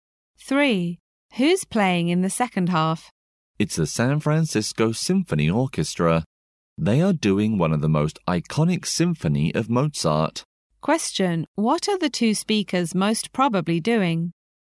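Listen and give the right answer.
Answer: Attending a concert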